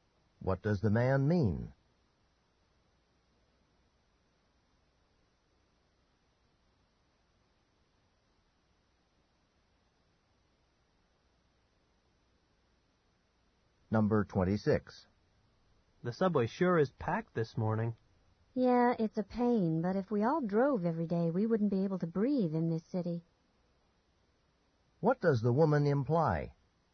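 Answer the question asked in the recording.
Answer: Taking the subway is better than driving because of air pollution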